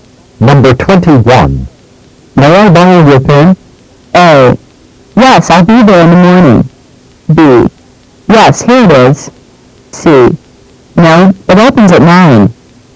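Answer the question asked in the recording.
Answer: B: Yes, here it is.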